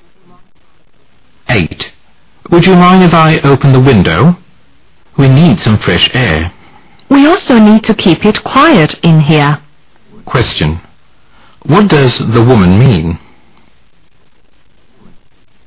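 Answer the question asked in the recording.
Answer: She would rather keep the window closed because of the noise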